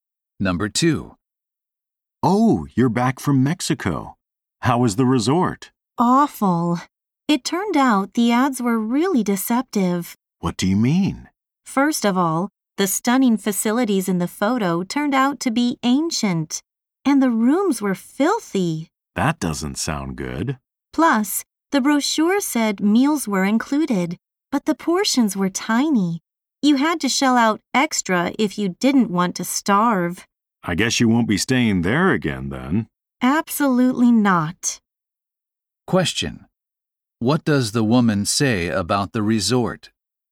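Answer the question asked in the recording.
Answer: Its advertising was misleading.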